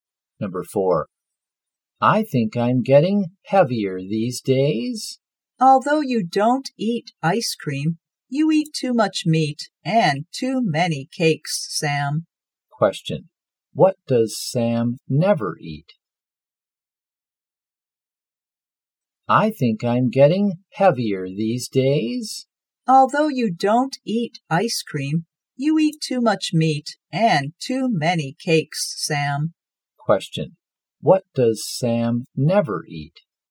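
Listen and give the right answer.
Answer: Ice cream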